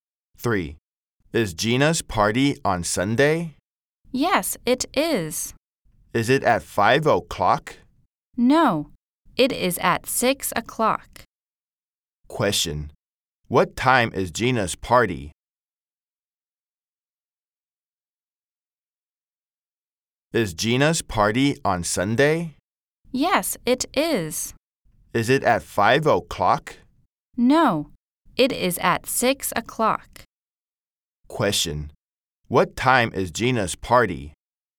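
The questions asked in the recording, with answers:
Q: Question,What time is Gina's party?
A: 6 o'clock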